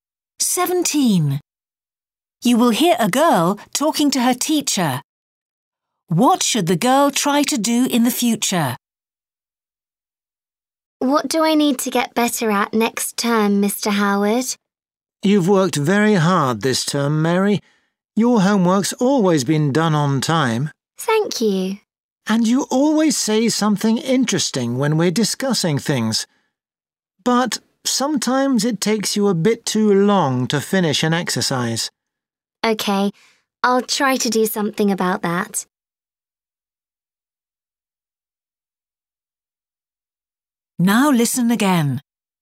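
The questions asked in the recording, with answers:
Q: What should the girl try to do in the future?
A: Finish exercises more quickly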